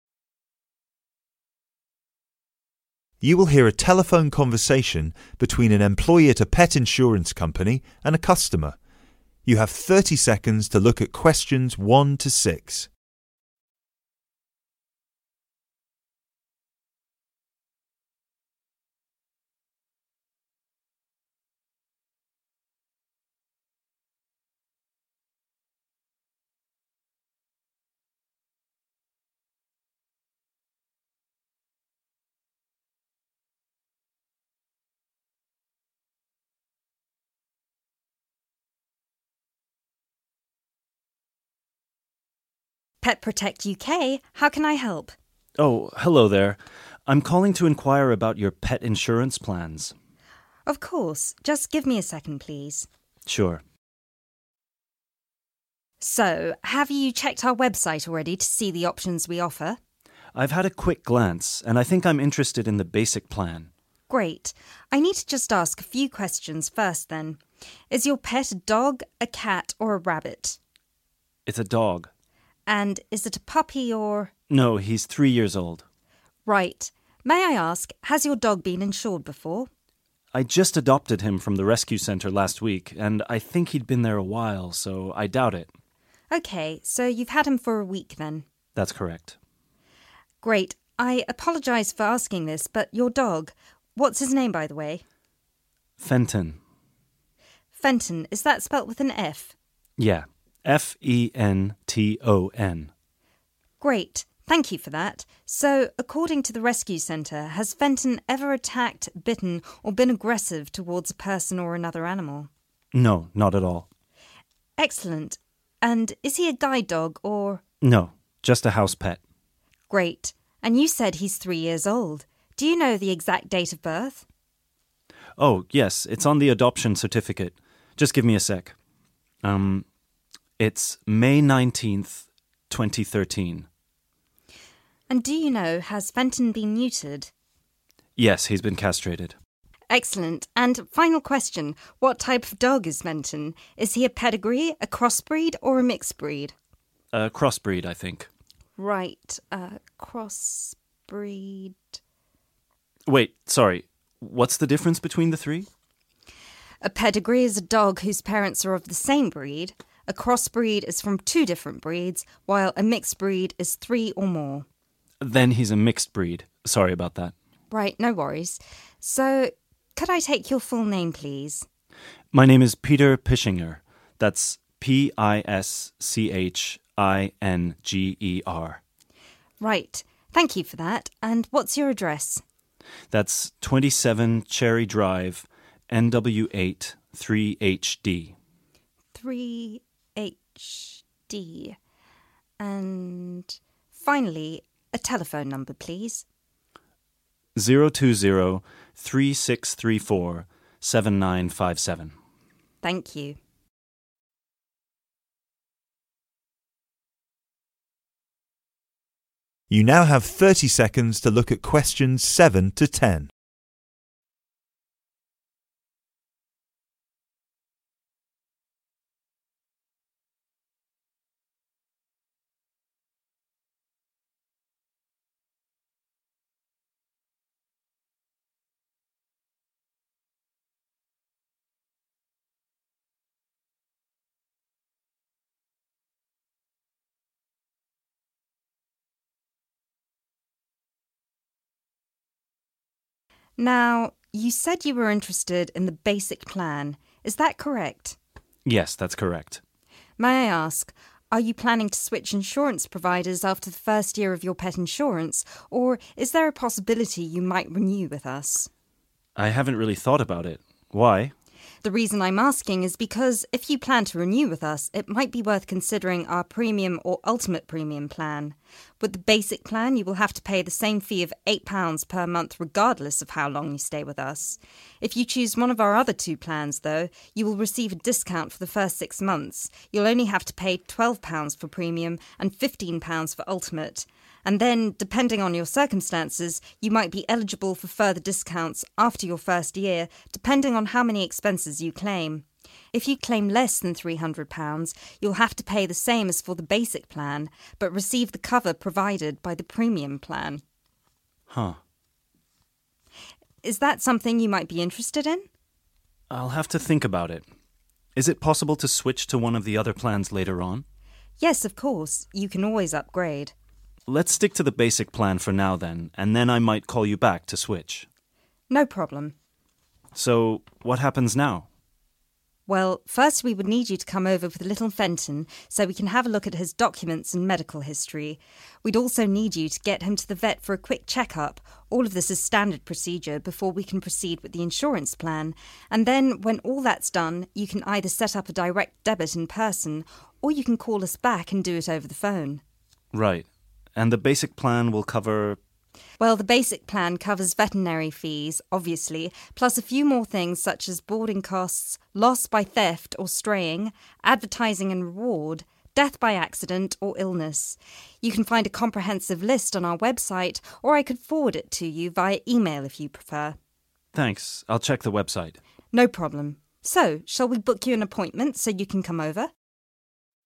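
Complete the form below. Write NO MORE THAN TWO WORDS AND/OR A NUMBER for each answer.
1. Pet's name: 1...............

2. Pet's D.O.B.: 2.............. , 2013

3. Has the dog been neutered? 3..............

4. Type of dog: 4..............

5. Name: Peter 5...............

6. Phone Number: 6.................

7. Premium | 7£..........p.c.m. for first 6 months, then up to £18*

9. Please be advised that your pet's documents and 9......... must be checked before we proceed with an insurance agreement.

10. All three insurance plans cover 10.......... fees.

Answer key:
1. Fenton
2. May 19th
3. Yes
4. mixed breed
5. Pischinger
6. 020-3634-7957
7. 12
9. medical history
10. veterinary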